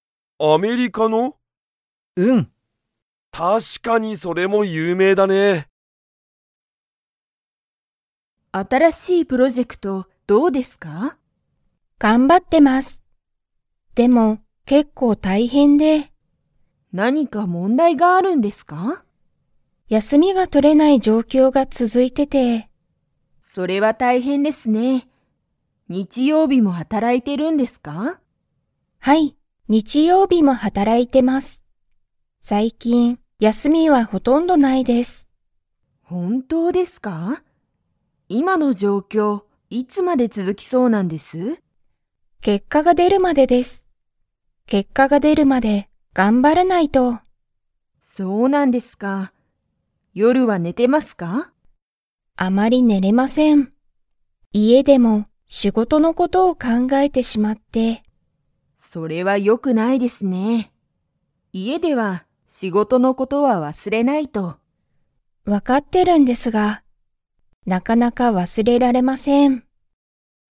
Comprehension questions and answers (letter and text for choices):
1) 新(あたら)しいプロジェクトは、____。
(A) 結果(けっか)が出(で)た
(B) 結構大変(けっこうたいへん)だ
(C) いい状況(じょうきょう)だ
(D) 問題(もんだい)がない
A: (B) 結構大変(けっこうたいへん)だ

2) 土谷(つちや)さんは、夜寝(よるね)れていますか?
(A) はい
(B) いいえ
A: (B) いいえ

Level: Level 2